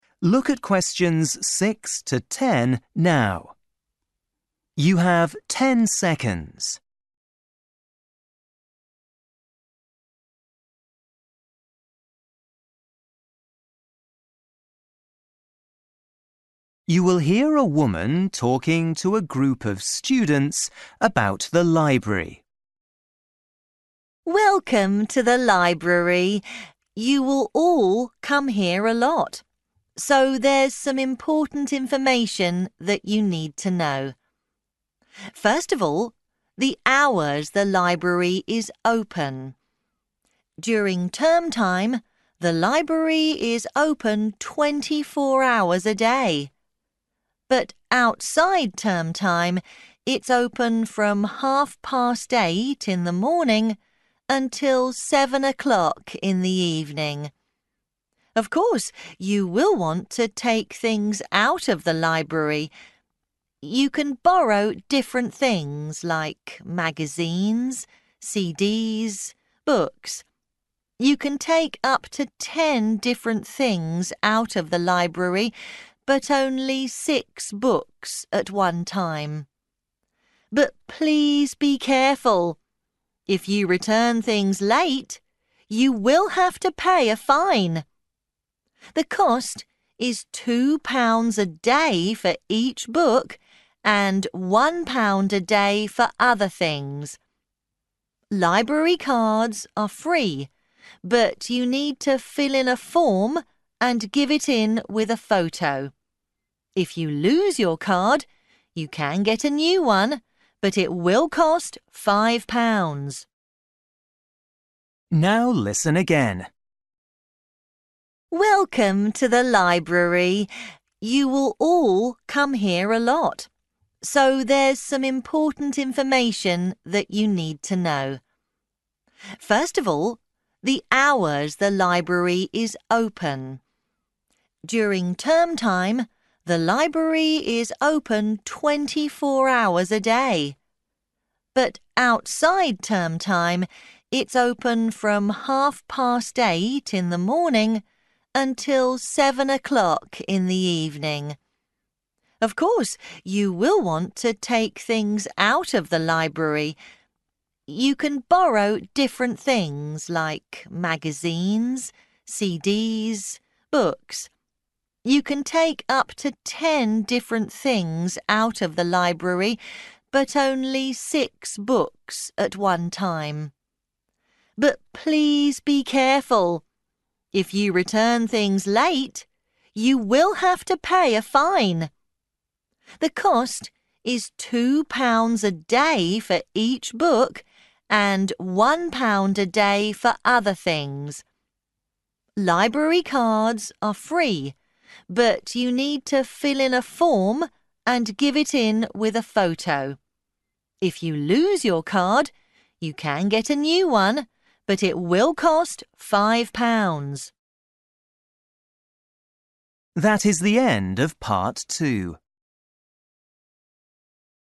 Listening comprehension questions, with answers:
For each question, write the correct answer in the gap. Write one word or a number or a date or a time.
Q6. (6) ...............- 7.00 p.m.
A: 8.30

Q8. (8) £............... per day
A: 1

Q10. (10) ...............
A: photo

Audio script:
Woman: Welcome to the library. You will all come here a lot, so there's some important information that you need to know.
First of all, the hours the library is open. During term time, the library is open 24 hours a day. But outside term time, it's open from half past eight in the morning until seven o'clock in the evening.
Of course, you will want to take things out of the library. You can borrow different things, like magazines, CDs, books. You can take up to ten different things out of the library, but only six books at one time. But please be careful! If you return things late, you will have to pay a fine! The cost is two pounds a day for each book and one pound a day for other things. Library cards are free, but you need to fill in a form and give it in with a photo. If you lose your card, you can get a new one, but it will cost five pounds.
Now listen again.

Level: KET (A2)